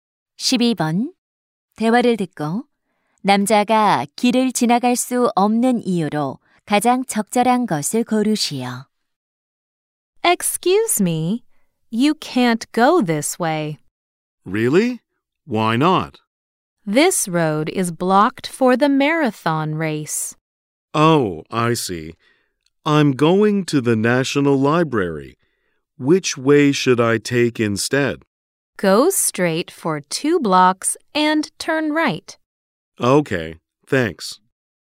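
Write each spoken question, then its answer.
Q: 대화를 듣고 남자가 길을 지나갈 수 없는 이유로 가장 적절한 것을 고르시오.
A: 마라톤 경기로 도로가 통제되어서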